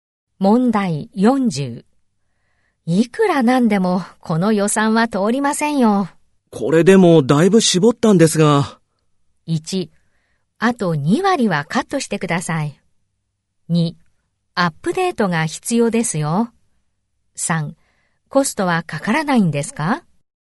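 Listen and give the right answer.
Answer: 1: あと2割はカットしてください。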